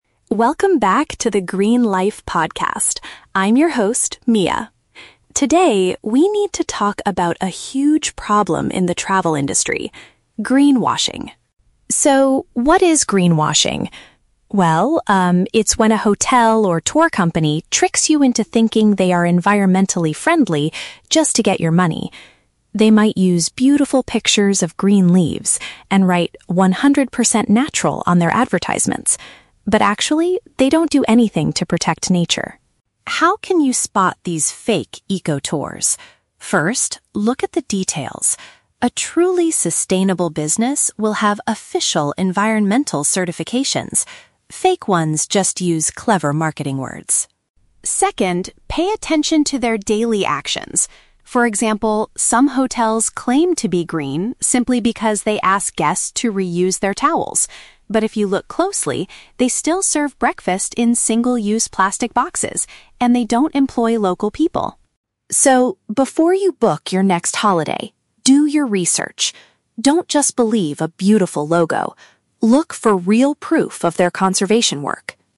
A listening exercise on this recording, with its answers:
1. What is the main characteristic of a "greenwashing" business?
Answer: They use nature photos to deceive customers.

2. According to Mia, how can travelers identify a genuinely eco-friendly company?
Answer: By checking if the business has formal eco-labels.

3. What example does Mia give to show a hotel's fake "green" behavior?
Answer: They provide morning meals in materials that cannot be recycled.

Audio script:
Mia: Welcome back to the Green Life Podcast. I'm your host, Mia. Today, we need to talk about a huge problem in the travel industry: greenwashing.
So, what is greenwashing? Well, um, it's when a hotel or tour company tricks you into thinking they are environmentally friendly just to get your money. They might use beautiful pictures of green leaves and write "100% natural" on their advertisements. But actually, they don't do anything to protect nature.
How can you spot these fake eco-tours? First, look at the details. A truly sustainable business will have official environmental certifications. Fake ones just use clever marketing words.
Second, pay attention to their daily actions. For example, some hotels claim to be "green" simply because they ask guests to reuse their towels. But if you look closely, they still serve breakfast in single-use plastic boxes, and they don't employ local people.
So, before you book your next holiday, do your research. Don't just believe a beautiful logo. Look for real proof of their conservation work.